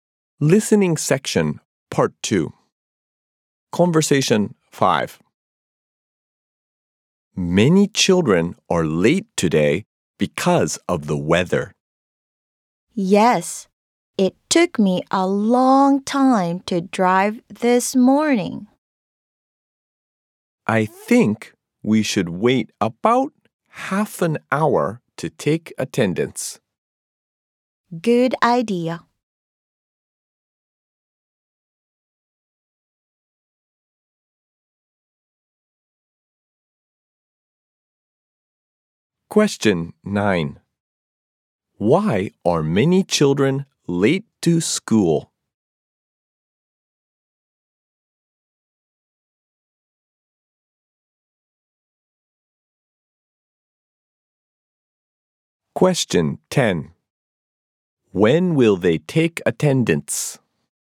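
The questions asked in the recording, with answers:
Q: Why are many children late to school?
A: Because of the weather

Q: When will they take attendance?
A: In about half an hour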